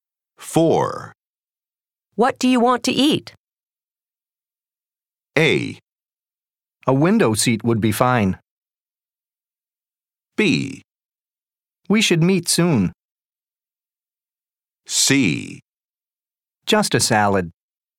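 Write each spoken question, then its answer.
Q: What do you want to eat?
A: C: Just a salad.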